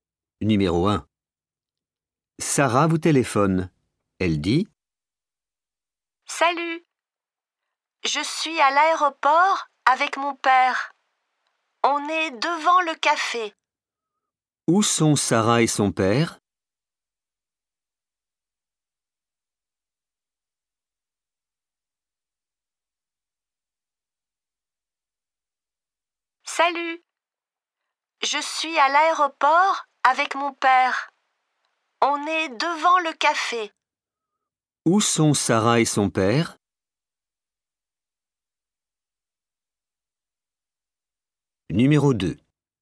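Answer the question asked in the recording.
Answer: Devant le café, à l'aéroport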